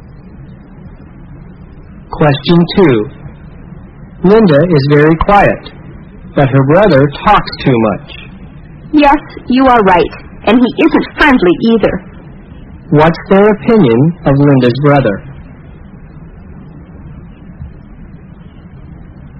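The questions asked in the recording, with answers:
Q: What's their opinion of Linda's brother?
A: He talks too much and isn't friendly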